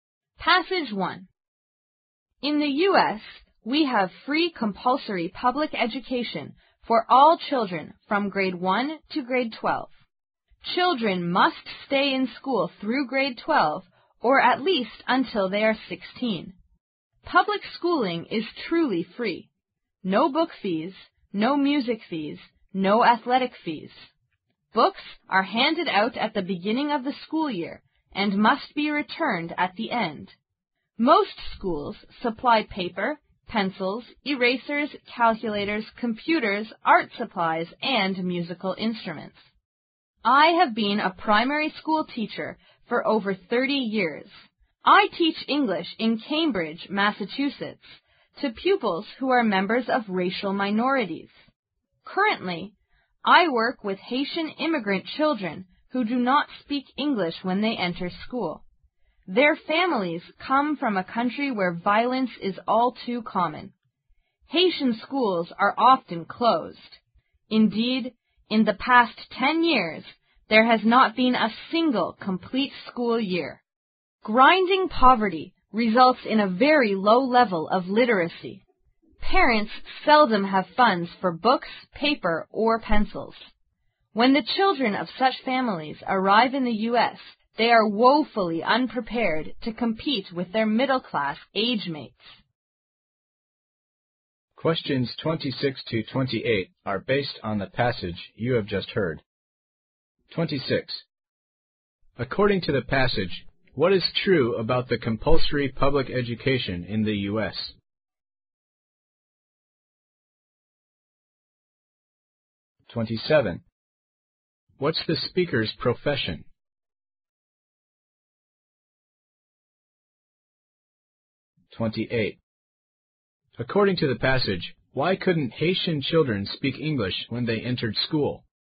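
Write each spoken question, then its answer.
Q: According to the passage, what is true about the compulsory public education in the U.S.?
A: It is free, from grade 1 to grade 12

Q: What's the speaker's profession?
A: Primary school teacher (of English)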